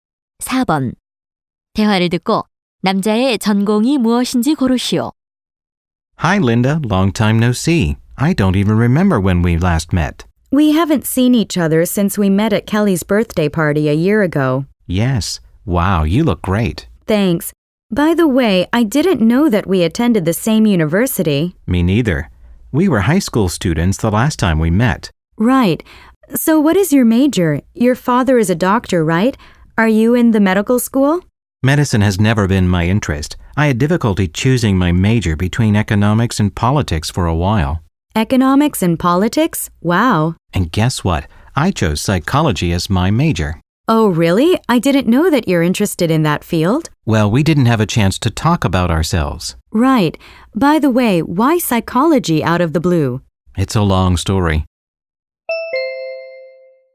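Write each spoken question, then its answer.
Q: 대화를 듣고 남자의 전공이 무엇인지 고르시오.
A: 심리학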